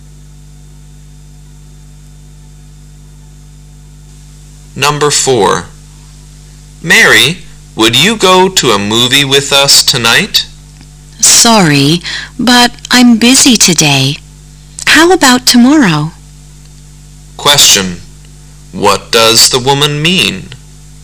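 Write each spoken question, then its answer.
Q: What does the woman mean?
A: She can't go tonight but could go tomorrow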